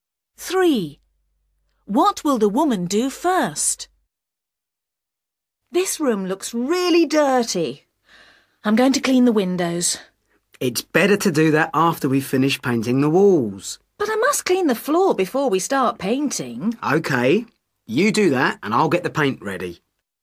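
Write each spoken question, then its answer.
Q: What will the woman do first?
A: Clean the floor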